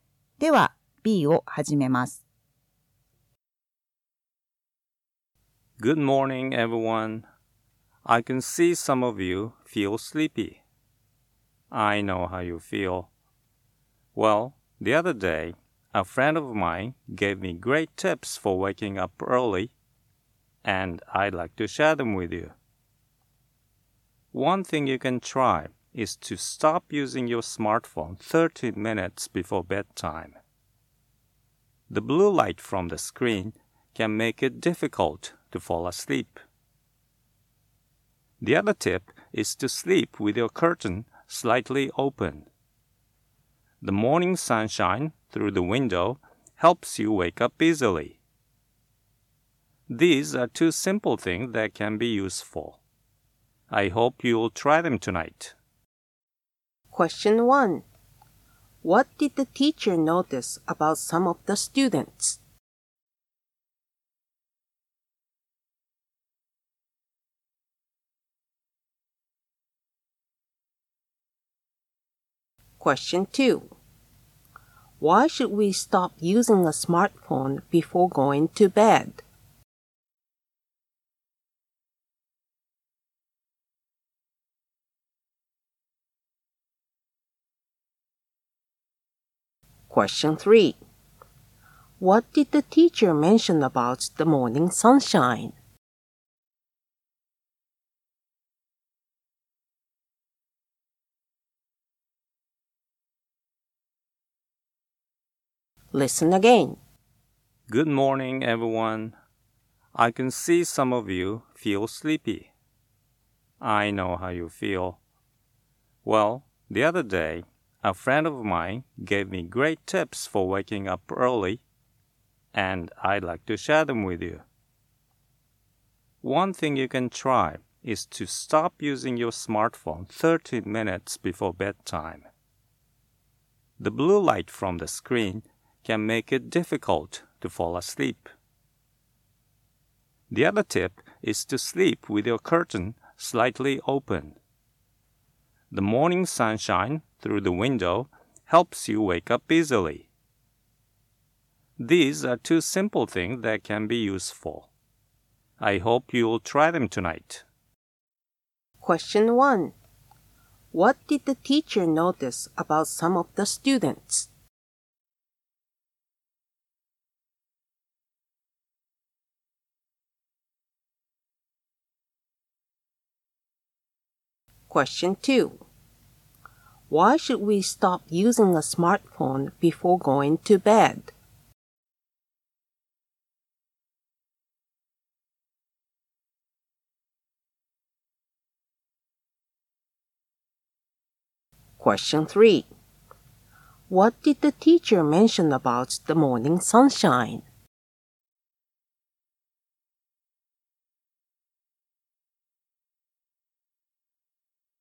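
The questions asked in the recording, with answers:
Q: What did the teacher notice about some of the students?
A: They felt sleepy

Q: Why should we stop using a smartphone before going to bed?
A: The blue light from the screen can make it difficult to fall asleep

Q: What did the teacher mention about the morning sunshine?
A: It helps you wake up easily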